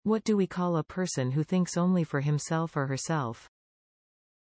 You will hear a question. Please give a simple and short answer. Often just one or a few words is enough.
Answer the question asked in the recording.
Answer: Selfish